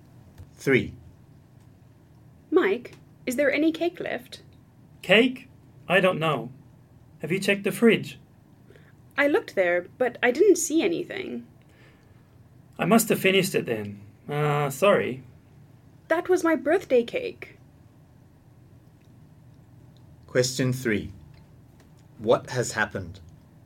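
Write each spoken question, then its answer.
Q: What has happened?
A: Mike ate Jane's birthday cake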